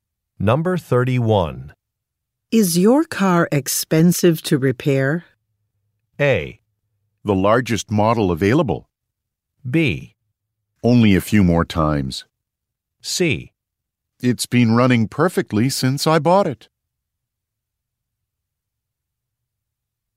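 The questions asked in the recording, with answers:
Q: Is your car expensive to repair?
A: C: It's been running perfectly since I bought it.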